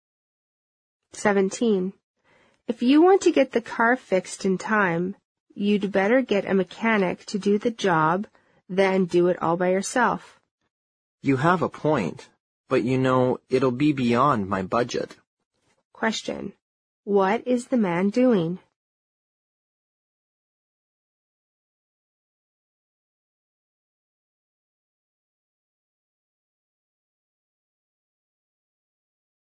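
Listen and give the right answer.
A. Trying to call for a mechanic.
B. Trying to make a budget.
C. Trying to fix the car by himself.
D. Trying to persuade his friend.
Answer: C. Trying to fix the car by himself.

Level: 六级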